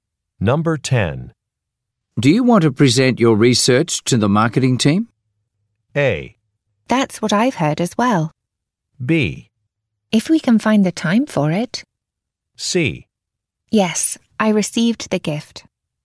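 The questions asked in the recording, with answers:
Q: Do you want to present your research to the marketing team?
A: B: If we can find the time for it.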